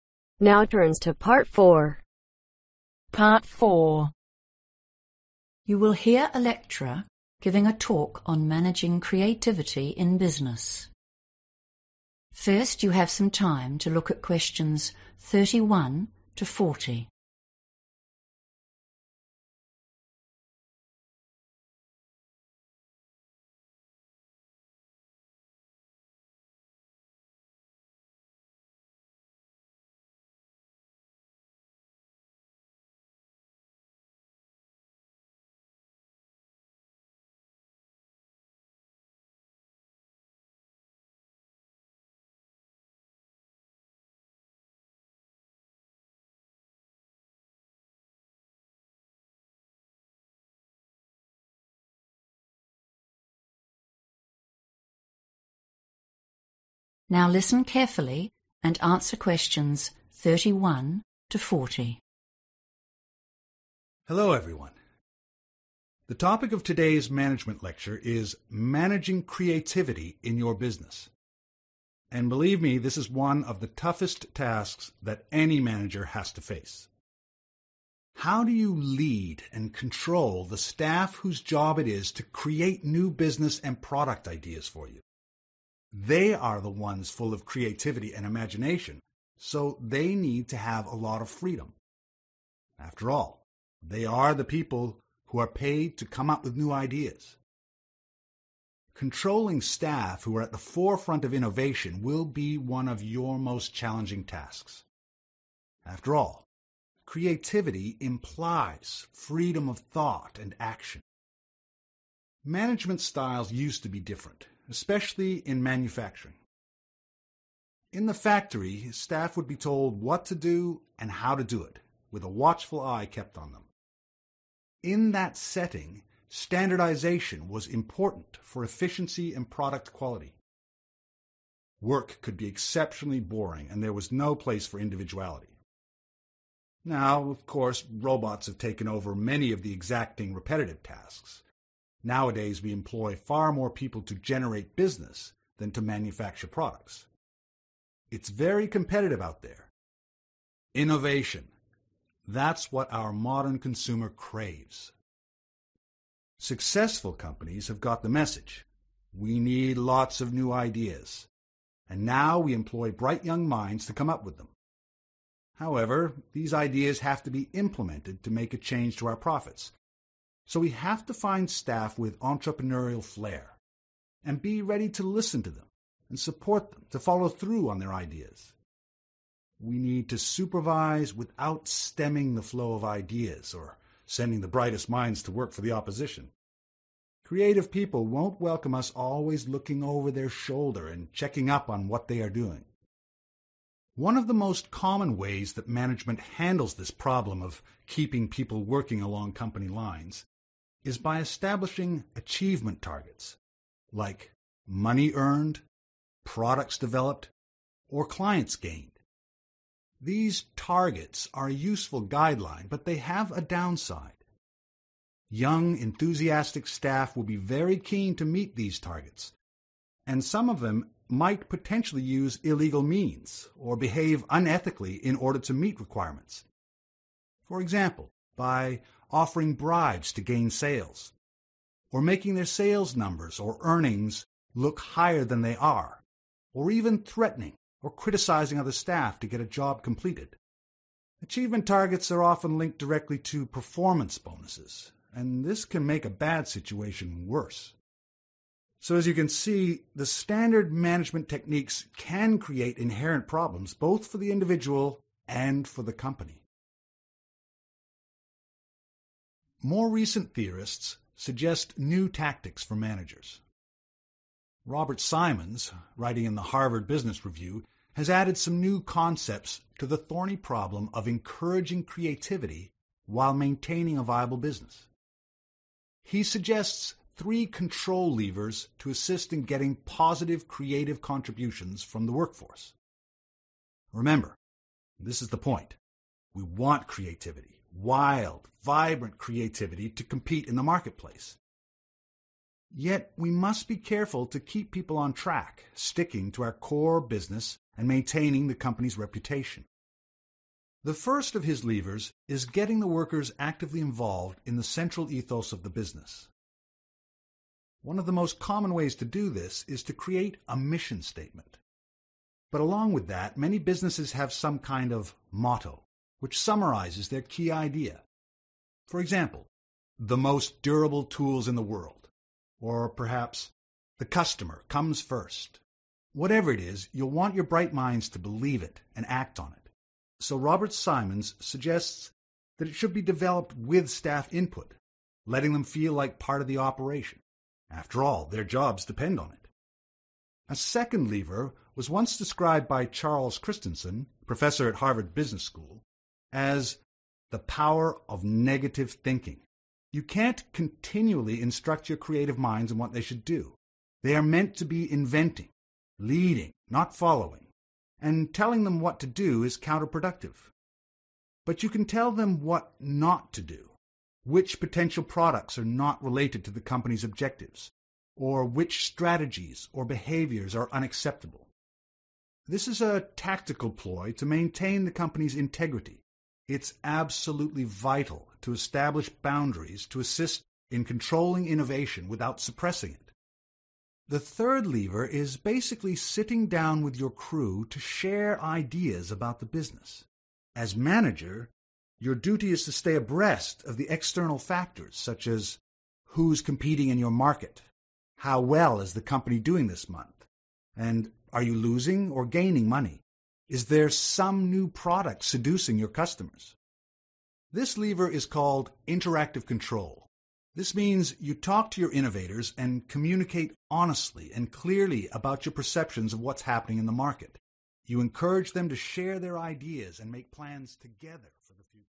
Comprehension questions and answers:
Complete the summary below. Write ONE WORD ONLY for each answer.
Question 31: They have creativity and (31)............ , so they need freedom.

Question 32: In the past, in factories, (32)............ was vital for making a high quality product.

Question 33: But, their new ideas must be (33)............ if we want to make money from them.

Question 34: A standard method for managing staff is setting (34)............ targets, related to profits, products or new clients.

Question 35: These goals are often tied in to (35)............ bonuses and this can make the problem worse.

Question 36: Robert Simon's Three (36)............ levers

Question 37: Follow the company (37)............ examples: the best tools in the world the customer is no 1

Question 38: The power of (38)............ thinking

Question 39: You need to set (39)............ to help control creativity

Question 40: (40)............ control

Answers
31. imagination
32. standardization
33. implemented
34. achievement
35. performance
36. control
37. motto
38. negative
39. boundaries
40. interactive